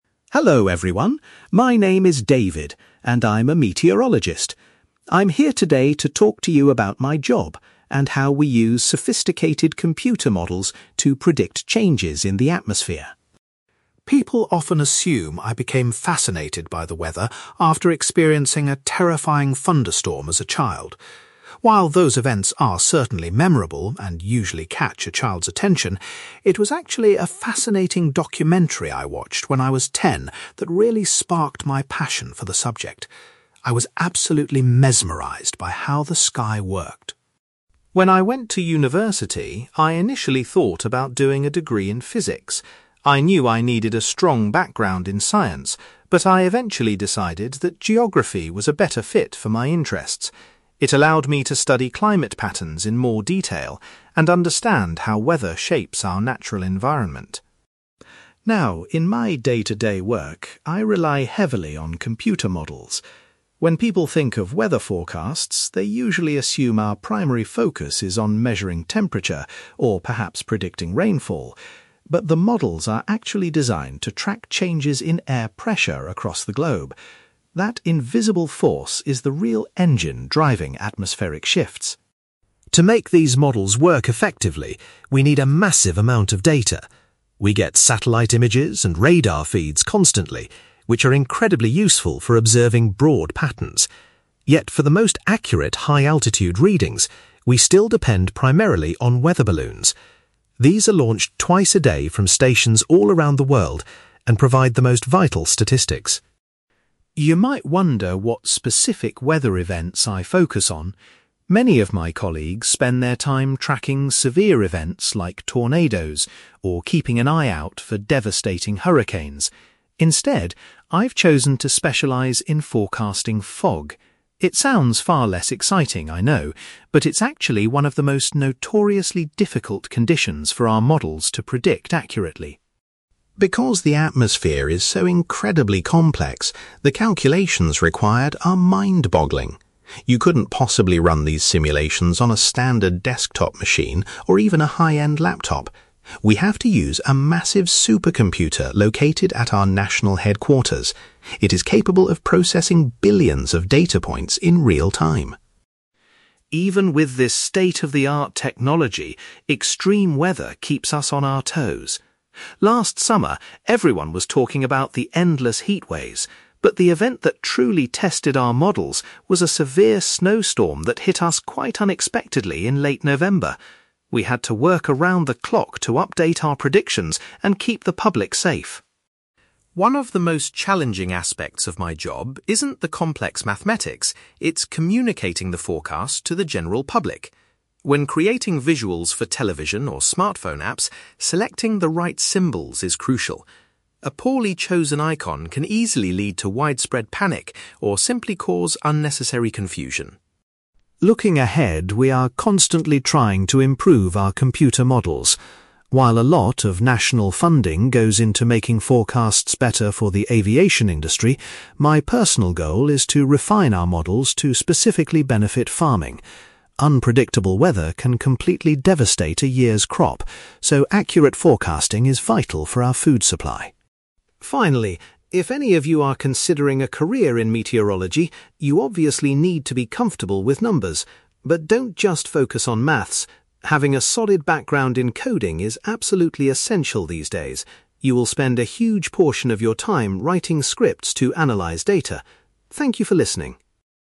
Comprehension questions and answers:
You will hear a meteorologist called David giving a talk about his work with computer models and weather forecasting. For questions 9-18, complete the sentences with a word or short phrase.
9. David explains that seeing a (9)........................... in his youth initially inspired his interest in the weather.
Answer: documentary

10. Despite considering a different subject, David ultimately completed his university studies in (10)........................... .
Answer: geography

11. David says that the computer models primarily monitor global shifts in (11)........................... rather than just temperature or rain.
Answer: air pressure

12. According to David, the most precise atmospheric data from high altitudes is gathered by (12)........................... .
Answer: weather balloons

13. Unlike some of his colleagues, David's particular area of expertise involves predicting (13)........................... .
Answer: fog

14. David points out that all the complex forecasting calculations are processed by a (14)........................... .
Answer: supercomputer

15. David recalls that a sudden (15)........................... late in the year presented a real challenge for their forecasting models.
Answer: snowstorm

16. When preparing public forecasts, David emphasizes the importance of using appropriate (16)........................... on screens to prevent misunderstandings.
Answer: symbols

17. In the future, David hopes that improved computer models will provide the most help to (17)........................... .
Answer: farming

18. David advises anyone wanting to enter the profession to develop their skills in (18)........................... .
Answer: coding

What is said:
David: Hello everyone, my name is David, and I'm a meteorologist. I'm here today to talk to you about my job, and how we use sophisticated computer models to predict changes in the atmosphere.
People often assume I became fascinated by the weather after experiencing a terrifying thunderstorm as a child. While those events are certainly memorable and usually catch a child's attention, it was actually a fascinating documentary I watched when I was ten that really sparked my passion for the subject. I was absolutely mesmerized by how the sky worked.
When I went to university, I initially thought about doing a degree in physics. I knew I needed a strong background in science, but I eventually decided that geography was a better fit for my interests. It allowed me to study climate patterns in more detail and understand how weather shapes our natural environment.
Now, in my day-to-day work, I rely heavily on computer models. When people think of weather forecasts, they usually assume our primary focus is on measuring temperature or perhaps predicting rainfall. But the models are actually designed to track changes in air pressure across the globe. That invisible force is the real engine driving atmospheric shifts.
To make these models work effectively, we need a massive amount of data. We get satellite images and radar feeds constantly, which are incredibly useful for observing broad patterns. Yet, for the most accurate high-altitude readings, we still depend primarily on weather balloons. These are launched twice a day from stations all around the world and provide the most vital statistics.
You might wonder what specific weather events I focus on. Many of my colleagues spend their time tracking severe events like tornadoes, or keeping an eye out for devastating hurricanes. Instead, I've chosen to specialize in forecasting fog. It sounds far less exciting, I know, but it's actually one of the most notoriously difficult conditions for our models to predict accurately.
Because the atmosphere is so incredibly complex, the calculations required are mind-boggling. You couldn't possibly run these simulations on a standard desktop machine or even a high-end laptop. We have to use a massive supercomputer located at our national headquarters. It is capable of processing billions of data points in real-time.
Even with this state-of-the-art technology, extreme weather keeps us on our toes. Last summer, everyone was talking about the endless heatwaves, but the event that truly tested our models was a severe snowstorm that hit us quite unexpectedly in late November. We had to work around the clock to update our predictions and keep the public safe.
One of the most challenging aspects of my job isn't the complex mathematics—it's communicating the forecast to the general public. When creating visuals for television or smartphone apps, selecting the right symbols is crucial. A poorly chosen icon can easily lead to widespread panic or simply cause unnecessary confusion.
Looking ahead, we are constantly trying to improve our computer models. While a lot of national funding goes into making forecasts better for the aviation industry, my personal goal is to refine our models to specifically benefit farming. Unpredictable weather can completely devastate a year's crop, so accurate forecasting is vital for our food supply.
Finally, if any of you are considering a career in meteorology, you obviously need to be comfortable with numbers. But don't just focus on maths. Having a solid background in coding is absolutely essential these days. You will spend a huge portion of your time writing scripts to analyze data. Thank you for listening!

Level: B2